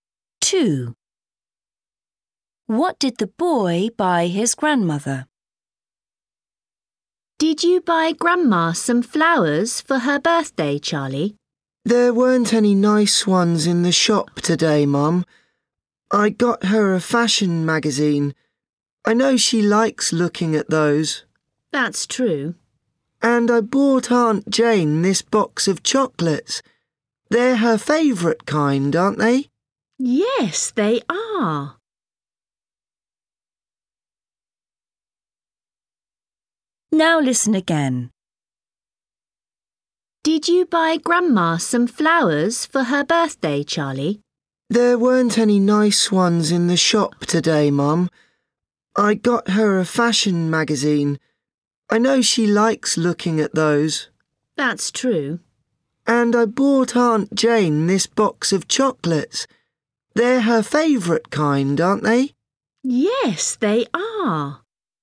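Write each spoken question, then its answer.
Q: What did the boy buy his grandmother?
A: a fashion magazine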